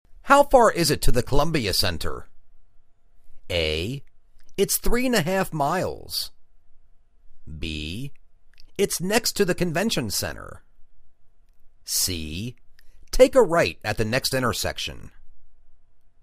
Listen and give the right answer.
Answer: It's three-and-a-half miles.